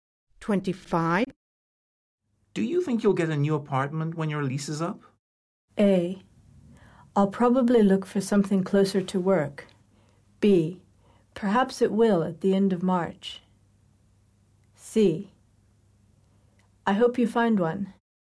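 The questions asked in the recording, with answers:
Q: Do you think you'll get a new apartment when your lease is up?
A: A: I'll probably look for something closer to work.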